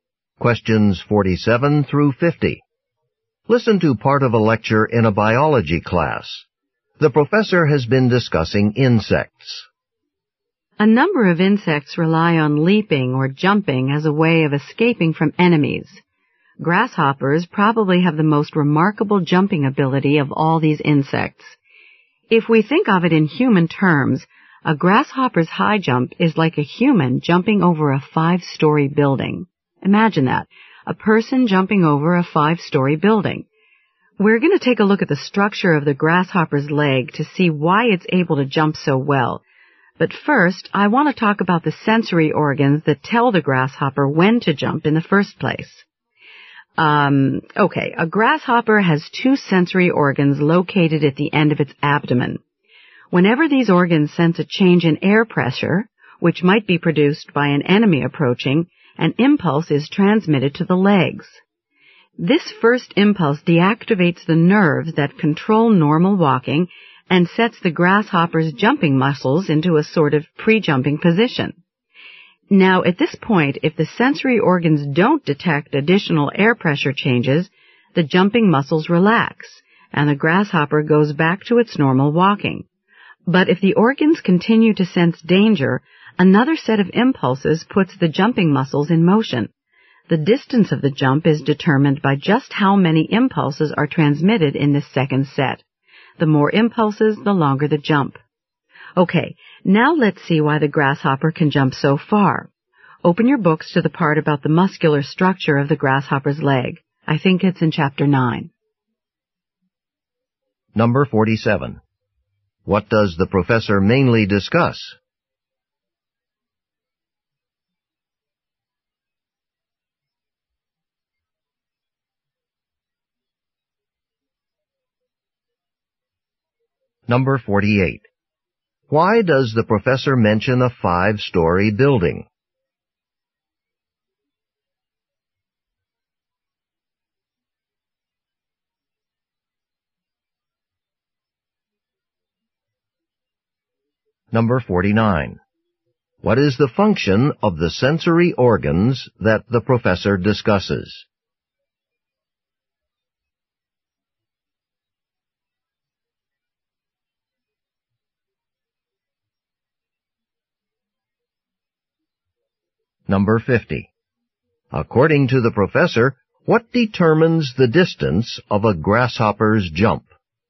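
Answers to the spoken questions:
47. How grasshoppers jump.
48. To show how remarkable a grasshopper's jumping ability is.
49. To detect changes in air pressure, which signal danger and tell the grasshopper when to jump.
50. How many impulses are sent in the second set.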